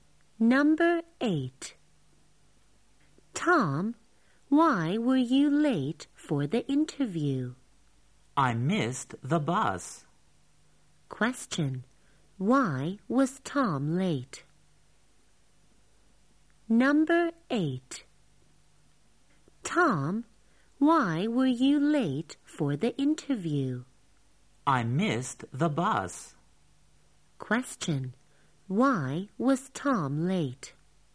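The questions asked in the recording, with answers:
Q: Why was Tom late?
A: He missed the bus.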